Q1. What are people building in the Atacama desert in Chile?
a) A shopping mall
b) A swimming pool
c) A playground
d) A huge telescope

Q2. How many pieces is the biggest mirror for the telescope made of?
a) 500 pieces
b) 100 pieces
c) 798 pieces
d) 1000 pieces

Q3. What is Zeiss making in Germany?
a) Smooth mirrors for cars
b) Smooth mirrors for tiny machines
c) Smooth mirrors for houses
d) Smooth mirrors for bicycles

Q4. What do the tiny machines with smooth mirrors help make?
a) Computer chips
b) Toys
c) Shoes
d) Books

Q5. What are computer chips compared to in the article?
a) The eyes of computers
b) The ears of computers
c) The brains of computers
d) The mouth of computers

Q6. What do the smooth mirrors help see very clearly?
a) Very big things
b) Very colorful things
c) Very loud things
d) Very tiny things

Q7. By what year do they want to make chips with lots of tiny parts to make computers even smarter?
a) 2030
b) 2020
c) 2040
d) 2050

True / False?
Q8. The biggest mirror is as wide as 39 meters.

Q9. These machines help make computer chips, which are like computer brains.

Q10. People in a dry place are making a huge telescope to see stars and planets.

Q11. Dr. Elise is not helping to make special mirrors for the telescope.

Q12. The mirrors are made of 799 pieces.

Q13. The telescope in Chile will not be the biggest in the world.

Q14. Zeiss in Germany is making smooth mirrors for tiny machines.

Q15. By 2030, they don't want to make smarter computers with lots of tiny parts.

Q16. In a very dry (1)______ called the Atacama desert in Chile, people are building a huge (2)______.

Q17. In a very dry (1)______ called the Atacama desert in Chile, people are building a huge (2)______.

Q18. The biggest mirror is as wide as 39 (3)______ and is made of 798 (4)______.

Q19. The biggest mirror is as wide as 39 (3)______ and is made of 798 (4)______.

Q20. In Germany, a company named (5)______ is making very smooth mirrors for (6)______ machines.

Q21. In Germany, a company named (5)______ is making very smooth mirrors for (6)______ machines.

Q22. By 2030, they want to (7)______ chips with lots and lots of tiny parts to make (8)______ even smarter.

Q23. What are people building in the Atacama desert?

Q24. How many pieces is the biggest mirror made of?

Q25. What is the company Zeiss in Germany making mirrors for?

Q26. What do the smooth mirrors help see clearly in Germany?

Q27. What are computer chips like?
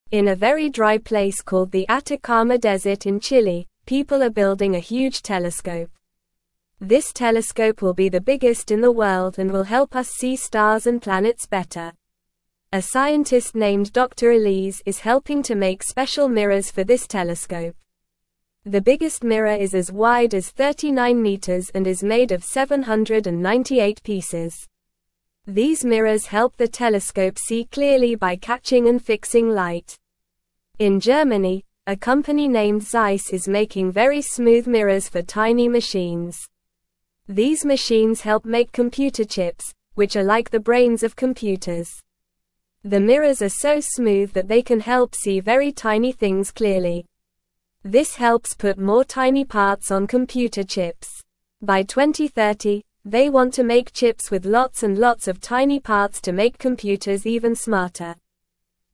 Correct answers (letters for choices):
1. d
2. c
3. b
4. a
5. c
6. d
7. a
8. True
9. True
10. True
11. False
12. False
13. False
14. True
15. False
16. place
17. telescope
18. meters
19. pieces
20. Zeiss
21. tiny
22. computers
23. They are building a huge telescope.
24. The biggest mirror is made of 798 pieces.
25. Zeiss is making mirrors for tiny machines.
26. The smooth mirrors help see very tiny things clearly.
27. Computer chips are like the brains of computers.

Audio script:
In a very dry place called the Atacama desert in Chile, people are building a huge telescope. This telescope will be the biggest in the world and will help us see stars and planets better. A scientist named Dr. Elise is helping to make special mirrors for this telescope. The biggest mirror is as wide as 39 meters and is made of 798 pieces. These mirrors help the telescope see clearly by catching and fixing light.
In Germany, a company named Zeiss is making very smooth mirrors for tiny machines. These machines help make computer chips, which are like the brains of computers. The mirrors are so smooth that they can help see very tiny things clearly. This helps put more tiny parts on computer chips. By 2030, they want to make chips with lots and lots of tiny parts to make computers even smarter.

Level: Level 1